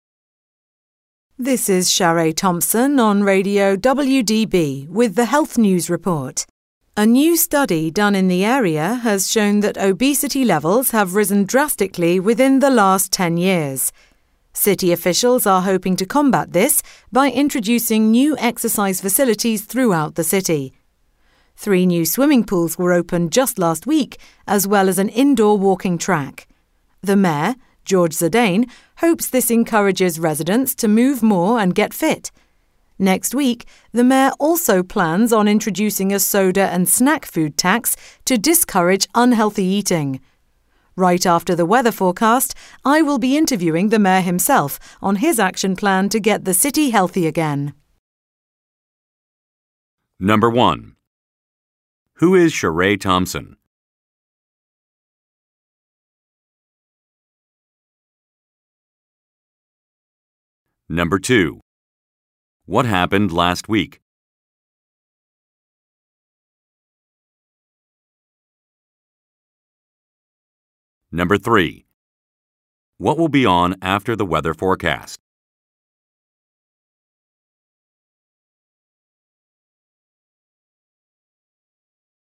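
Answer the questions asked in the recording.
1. A radio news reporter (Health News Report on Radio WDB)
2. Three new swimming pools and an indoor walking track were opened
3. An interview with the mayor about his plan to get the city healthy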